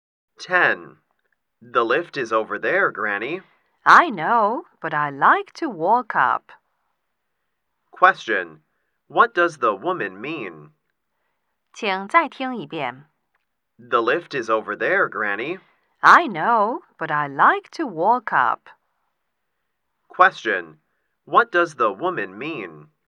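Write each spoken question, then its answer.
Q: what does the woman mean?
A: She would rather walk up the stairs than take the lift.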